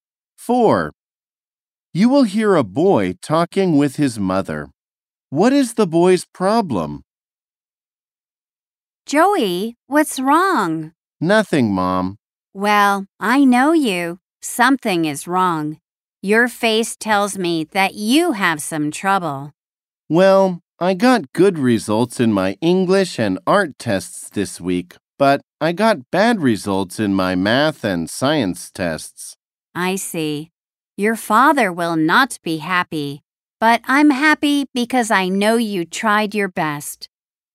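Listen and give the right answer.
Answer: He got bad results in his math and science tests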